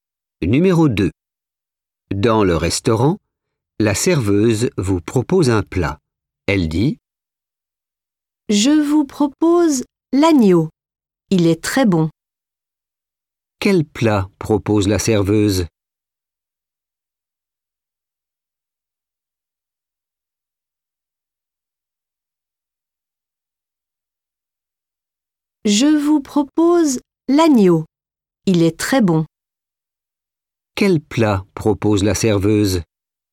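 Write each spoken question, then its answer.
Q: Quel plat propose la serveuse?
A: l'agneau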